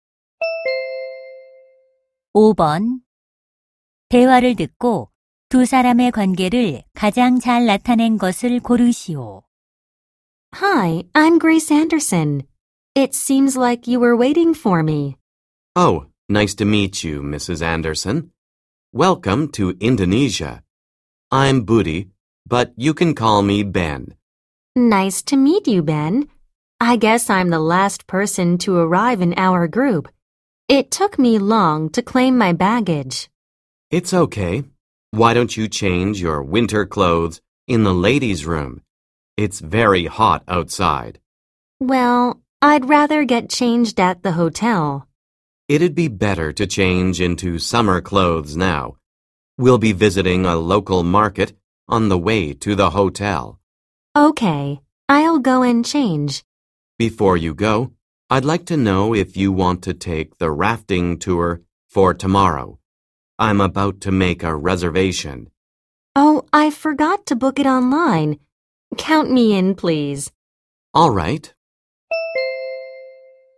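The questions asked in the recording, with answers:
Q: 대화를 듣고 두 사람의 관계를 가장 잘 나타낸 것을 고르시오.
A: 여행 가이드 - 관광객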